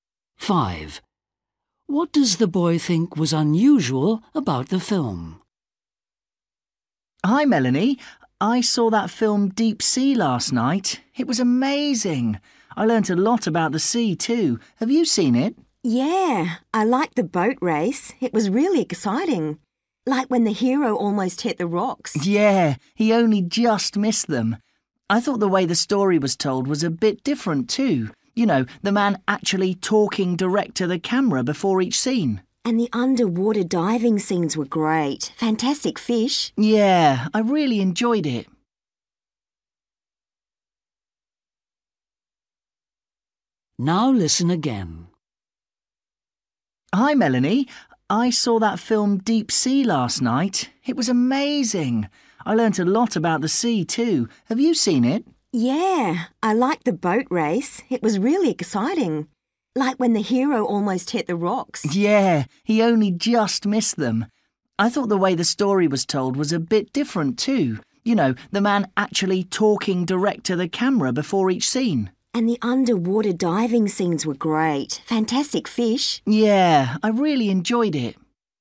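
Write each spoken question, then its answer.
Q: What does the boy think was unusual about the film?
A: A man talked directly to the camera before each scene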